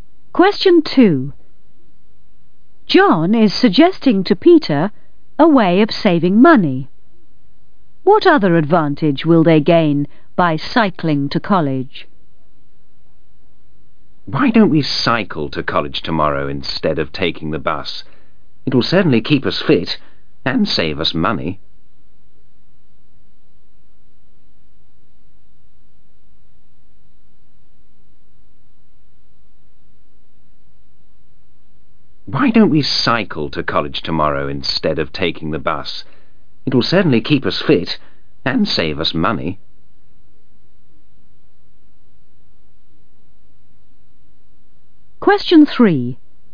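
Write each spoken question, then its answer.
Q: What other advantage will they gain by cycling to college?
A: It will keep them fit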